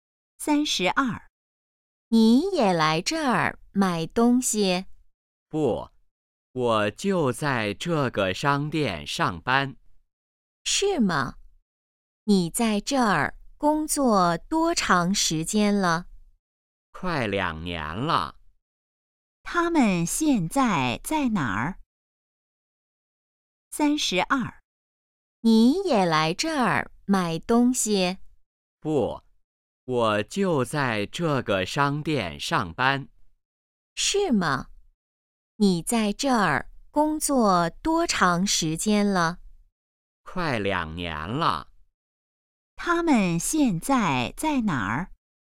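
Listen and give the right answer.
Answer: 商店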